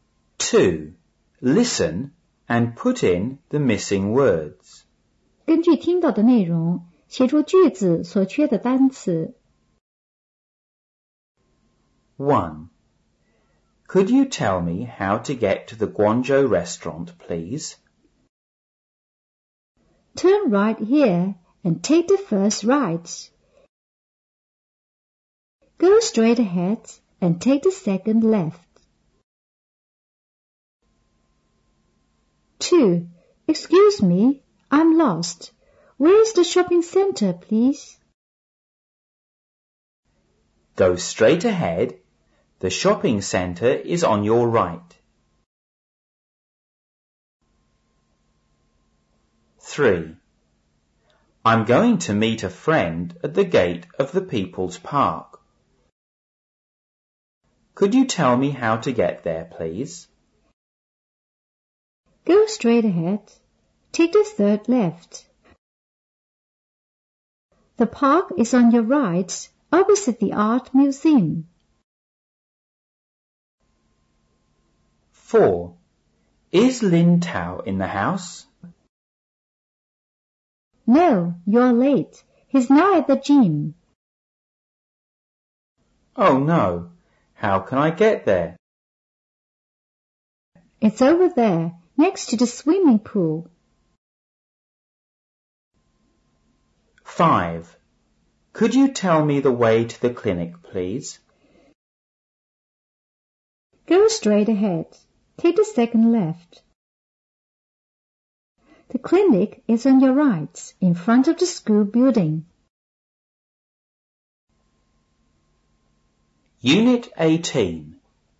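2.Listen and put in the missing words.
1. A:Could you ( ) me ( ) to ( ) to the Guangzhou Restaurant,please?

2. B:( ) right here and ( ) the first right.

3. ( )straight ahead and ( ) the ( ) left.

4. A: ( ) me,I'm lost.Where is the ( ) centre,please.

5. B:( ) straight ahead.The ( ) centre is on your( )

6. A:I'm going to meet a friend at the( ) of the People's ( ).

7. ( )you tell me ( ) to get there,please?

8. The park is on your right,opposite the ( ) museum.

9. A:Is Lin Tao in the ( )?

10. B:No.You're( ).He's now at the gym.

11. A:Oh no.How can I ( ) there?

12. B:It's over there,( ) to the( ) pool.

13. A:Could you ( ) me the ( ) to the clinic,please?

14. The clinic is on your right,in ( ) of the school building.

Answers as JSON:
{"1": "tell; how; get", "2": "Turn; take", "3": "Go; take; second", "4": "Excuse; shopping", "5": "Go; shopping; right", "6": "gate; Park", "7": "Could; how", "8": "art", "9": "house", "10": "late", "11": "get", "12": "next; swimming", "13": "tell; way", "14": "front"}

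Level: 五年级上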